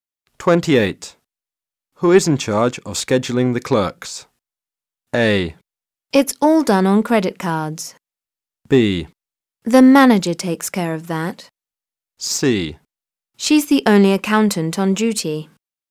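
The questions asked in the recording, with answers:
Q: Who is in charge of scheduling the clerks?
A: B: The manager takes care of that.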